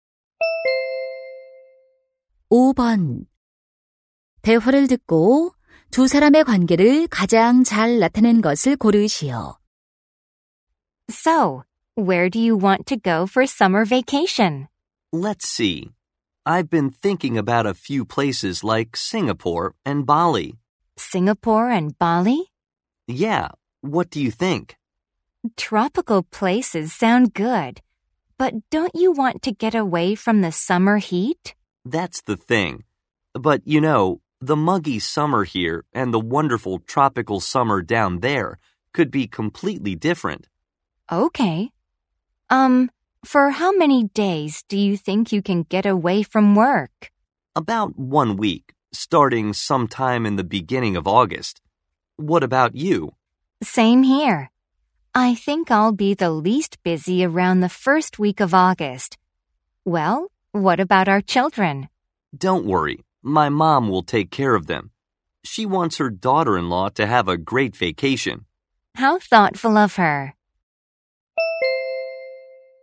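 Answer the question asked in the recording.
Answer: 부부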